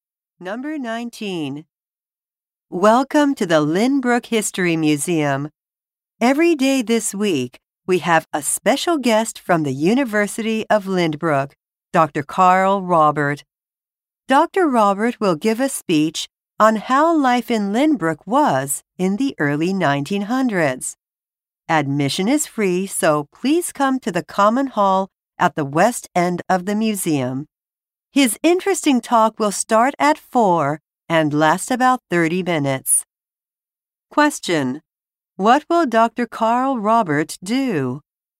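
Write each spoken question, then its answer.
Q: What will Dr. Carl Robert do?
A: Give a talk about life in Lynbrook in the early 1900s.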